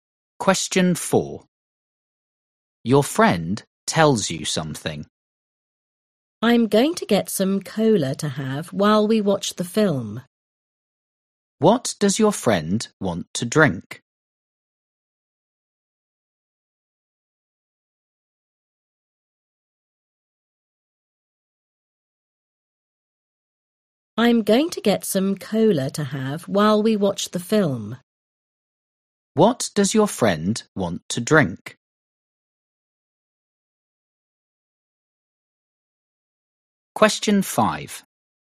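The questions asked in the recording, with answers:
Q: What does your friend want to drink?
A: Cola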